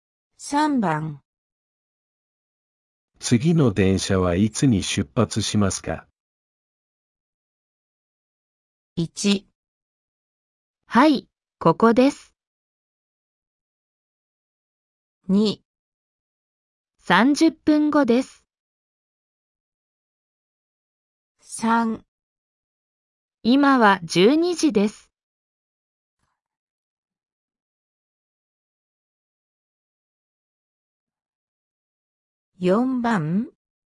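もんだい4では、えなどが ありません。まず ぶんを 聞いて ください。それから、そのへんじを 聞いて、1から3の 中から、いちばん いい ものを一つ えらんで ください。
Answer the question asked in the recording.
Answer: 2

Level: N4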